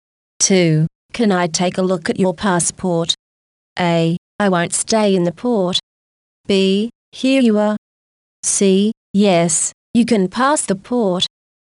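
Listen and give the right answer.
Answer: B: Here you are.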